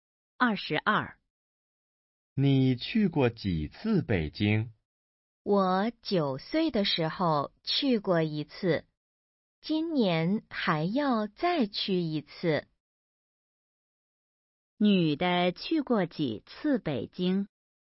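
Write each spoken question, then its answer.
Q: 女的去过几次北京?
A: 一次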